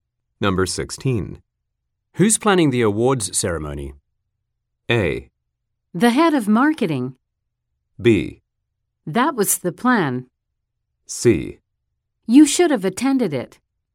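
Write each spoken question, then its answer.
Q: Who's planning the awards ceremony?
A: A: The head of marketing.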